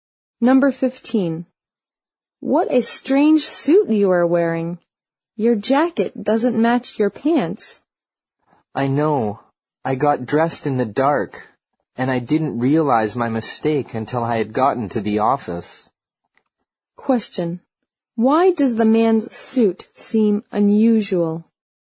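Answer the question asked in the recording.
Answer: His jacket doesn't match his pants.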